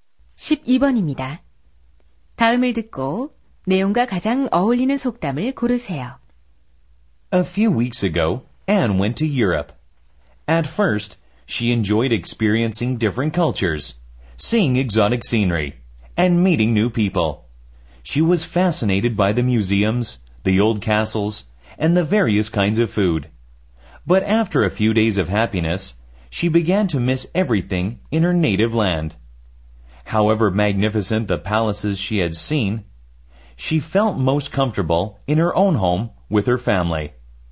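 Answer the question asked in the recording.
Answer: 집만 한 곳은 없다 (There's no place like home)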